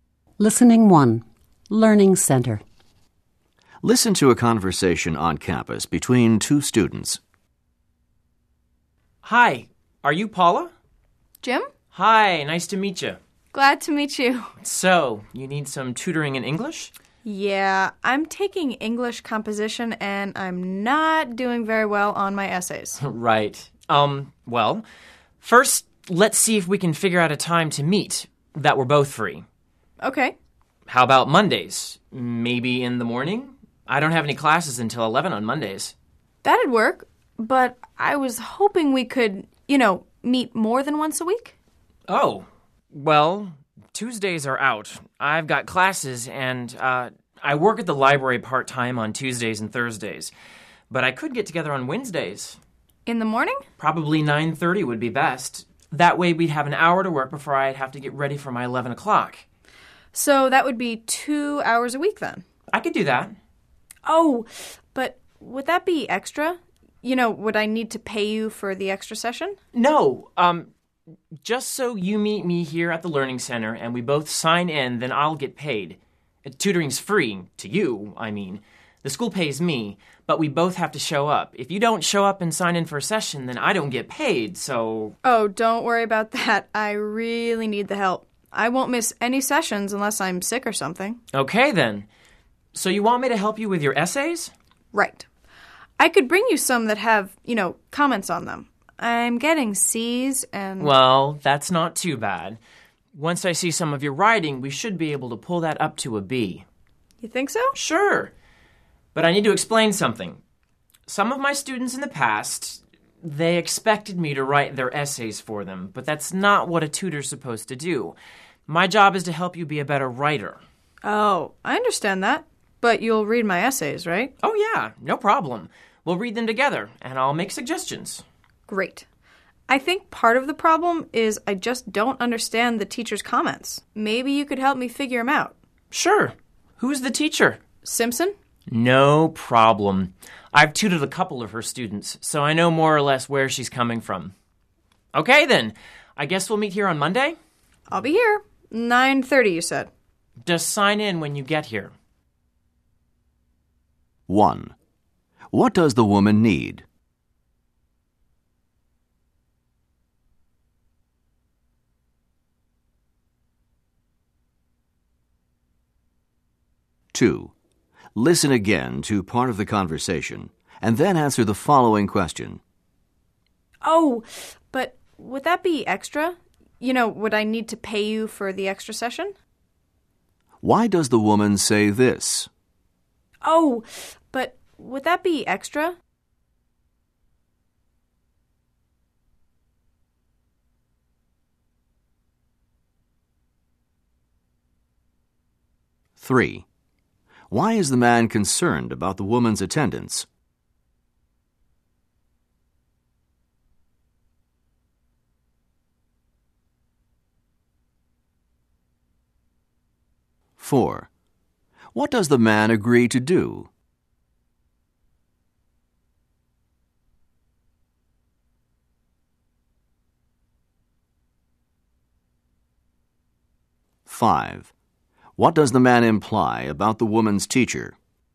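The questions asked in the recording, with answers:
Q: What does the woman need?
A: Tutoring to help with her English composition essays

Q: Why does the woman say this?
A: To ask whether she has to pay for the extra session

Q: Why is the man concerned about the woman's attendance?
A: He gets paid only if both of them show up and sign in

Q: What does the man agree to do?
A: Tutor her twice a week, read her essays with her and make suggestions

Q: What does the man imply about the woman's teacher?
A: He knows what she expects because he has tutored her students before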